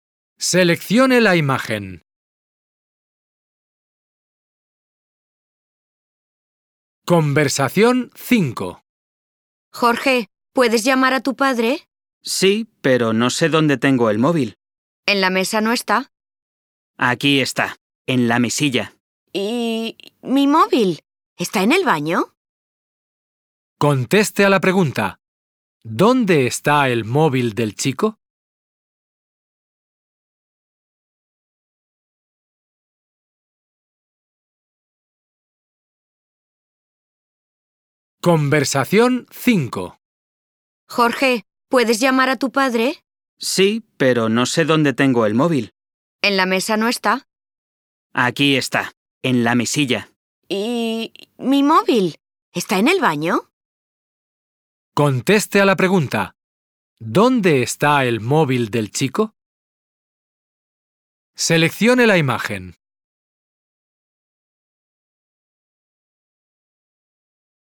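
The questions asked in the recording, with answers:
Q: ¿Dónde está el móvil del chico?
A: En la mesilla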